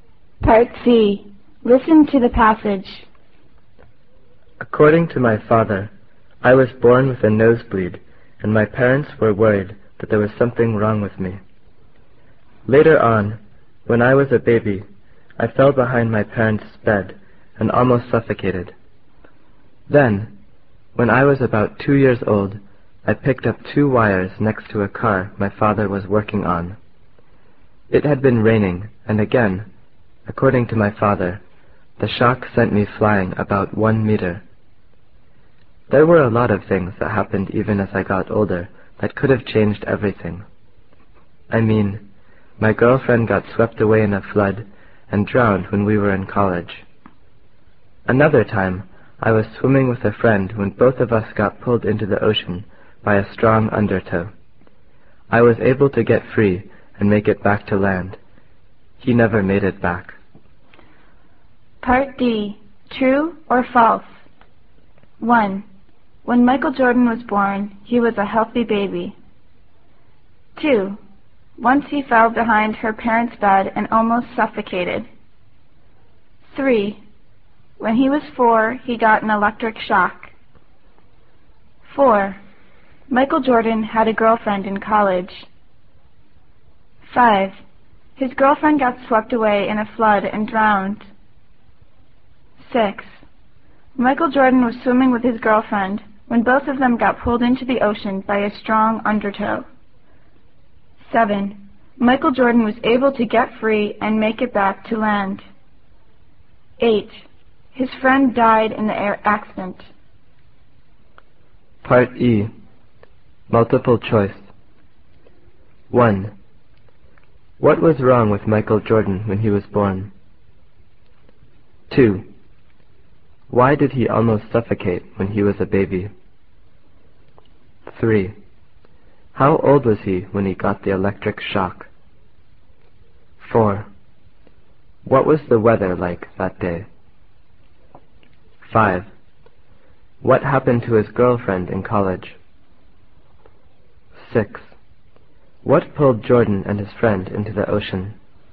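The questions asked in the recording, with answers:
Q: When Michael Jordan was born, he was a healthy baby.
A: False

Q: Once he fell behind her parents' bed and almost suffocated.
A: True

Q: When he was 4, he got an electric shock.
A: False

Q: Michael Jordan had a girlfriend in college.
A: True

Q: His girlfriend got swept away in a flood and drowned.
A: True

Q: Michael Jordan was swimming with his girlfriend when both of them got pulled into the ocean by a strong undertow.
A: False

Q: Michael Jordan was able to get free and make it back to land.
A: True

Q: His friend died in the air accident.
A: False

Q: What was wrong with Michael Jordan when he was born?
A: I was born with a nosebleed.

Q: Why did he almost suffocate when he was a baby?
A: I fell behind my parents' bed and almost suffocated.

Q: How old was he when he got the electric shock?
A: About 2 years old

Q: What was the weather like that day?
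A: It had been raining

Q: What happened to his girlfriend in college?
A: My girlfriend got swept away in a flood and drowned when we were in college.

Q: What pulled Jordan and his friend into the ocean?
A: A strong undertow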